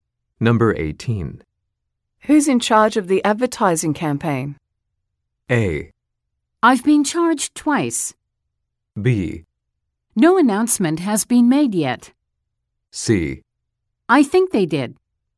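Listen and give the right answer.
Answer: B: No announcement has been made yet.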